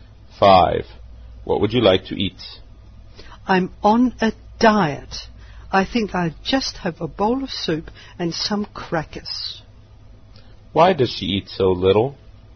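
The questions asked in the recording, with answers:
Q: Why does she eat so little?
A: She is on a diet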